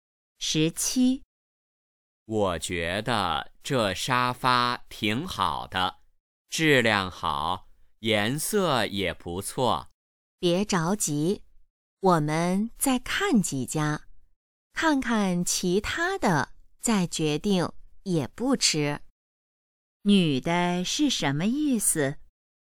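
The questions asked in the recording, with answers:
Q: 女的是什么意思?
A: 再看几家再决定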